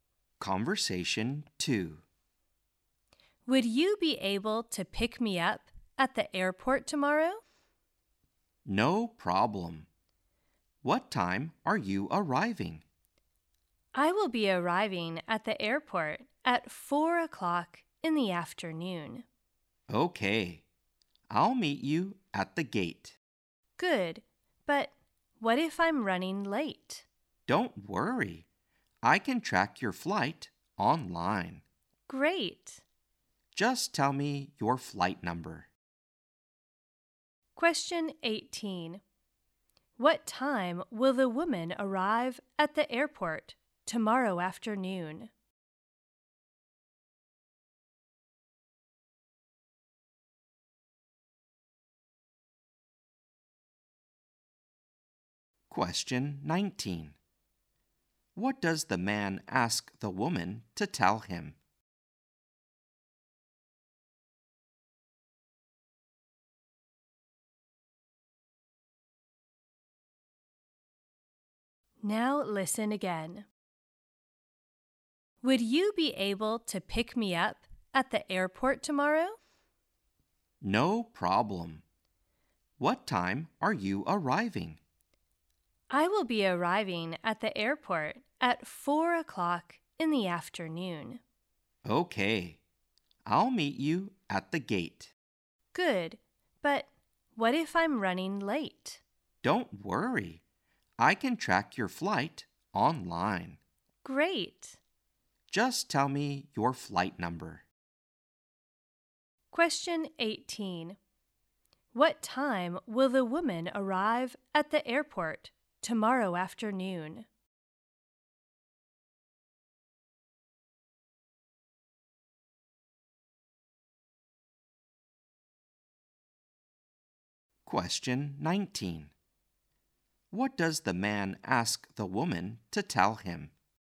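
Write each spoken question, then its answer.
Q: What time will the woman arrive at the airport tomorrow afternoon?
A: At 4 o'clock

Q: What does the man ask the woman to tell him?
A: Her flight number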